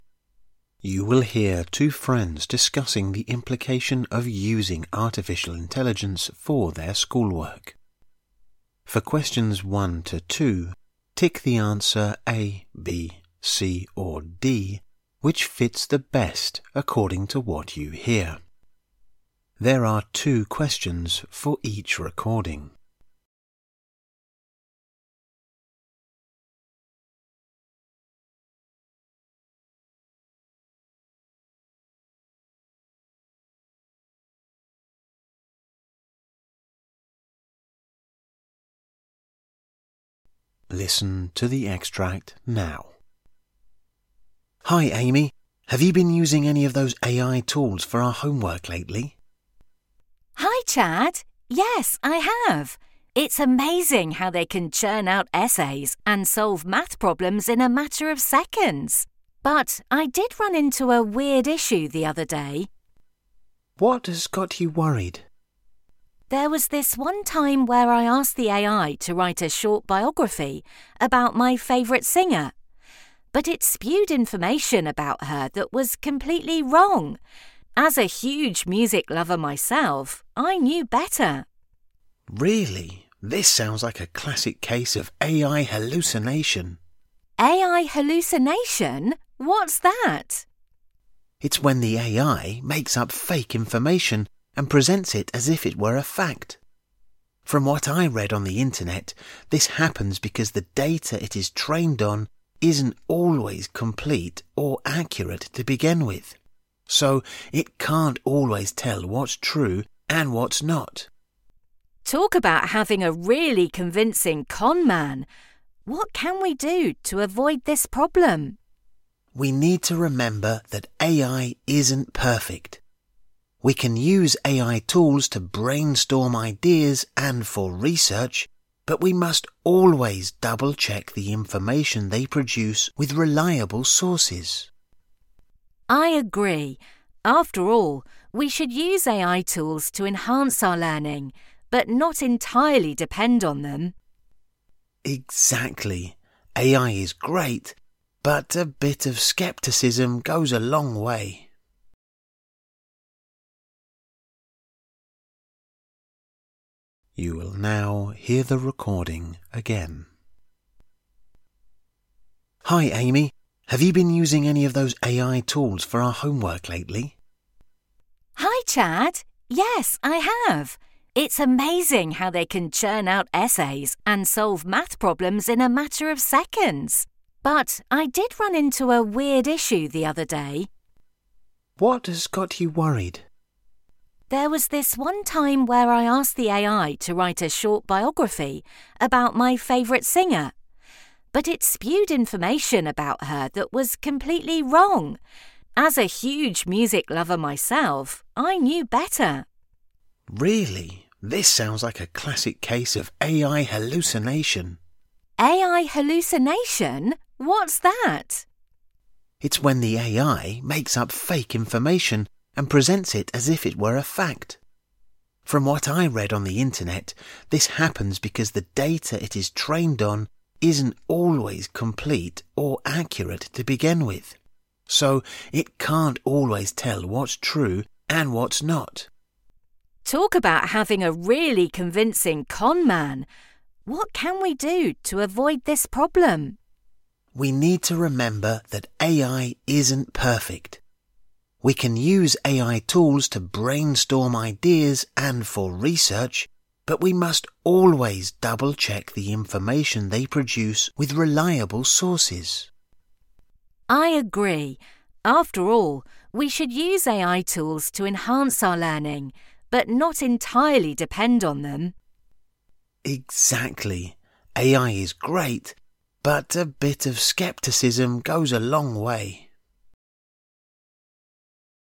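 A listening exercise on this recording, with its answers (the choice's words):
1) According to Chad, AI hallucination is caused by/when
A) The data it is trained on is not always complete or accurate to begin with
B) Fabricated data that is being used to train AI models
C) The developers who create the AI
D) The AI's hardware limitations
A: The data it is trained on is not always complete or accurate to begin with

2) The two friends agree that using AI for school work is fine as long as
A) They use it less frequently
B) They make sure to verify AI-generated information with reliable sources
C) The AI produces the desired answer they are looking for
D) They use it as a starting point for their work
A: They make sure to verify AI-generated information with reliable sources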